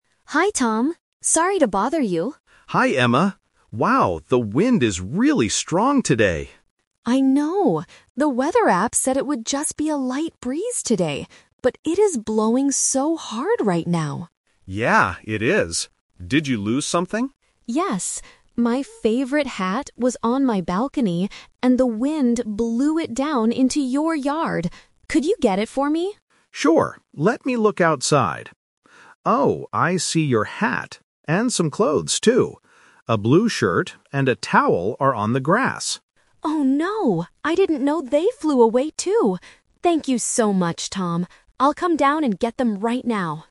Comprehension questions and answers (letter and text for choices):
Listen to the conversation and choose the best answer (A, B, or C).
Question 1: What did the weather app say about the wind today?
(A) It would blow very hard.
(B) It would be a light breeze.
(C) There would be a thunderstorm.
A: (B) It would be a light breeze.

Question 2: What did Emma initially think she lost?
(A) Only her favorite hat.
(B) A blue shirt and a towel.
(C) Her hat and her clothes.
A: (A) Only her favorite hat.

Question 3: What will Emma do next?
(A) She will stay on her balcony.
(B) She will go down to get her things.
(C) She will ask Tom to wash her clothes.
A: (B) She will go down to get her things.

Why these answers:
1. Emma explicitly states, "The weather app said it would just be a light breeze today." Option (A) is the trap because that is the actual weather right now, not what the app predicted. Option (C) is never mentioned.
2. Emma asks Tom to find her hat ("My favorite hat was on my balcony..."). Option (B) is the trap because Tom finds the shirt and towel later, and Emma says, "I didn't know they flew away too." Option (C) is incorrect because she didn't initially know about the clothes.
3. At the end of the conversation, Emma says, "I'll come down and get them right now." Option (A) is the trap because it is the opposite of what she decides to do. Option (C) is plausible between neighbors but is not mentioned in the audio.

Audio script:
Emma: Hi Tom! Sorry to bother you.
Tom: Hi Emma. Wow, the wind is really strong today!
Emma: I know! The weather app said it would just be a light breeze today. But it is blowing so hard right now.
Tom: Yeah, it is. Did you lose something?
Emma: Yes. My favorite hat was on my balcony, and the wind blew it down into your yard. Could you get it for me?
Tom: Sure. Let me look outside. Oh, I see your hat... and some clothes, too. A blue shirt and a towel are on the grass.
Emma: Oh no! I didn't know they flew away too. Thank you so much, Tom. I'll come down and get them right now.